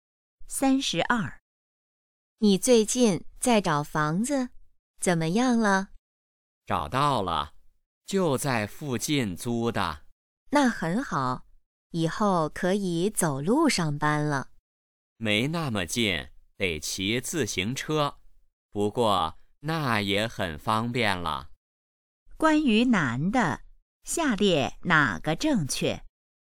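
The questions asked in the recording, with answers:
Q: 关于男的,下列哪个正确?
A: 在附近租了房子,骑自行车上班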